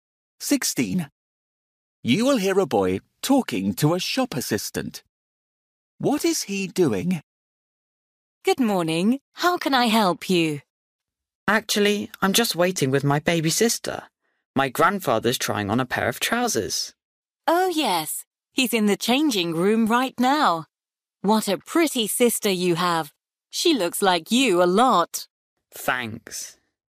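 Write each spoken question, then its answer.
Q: What is he doing?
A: Waiting with his baby sister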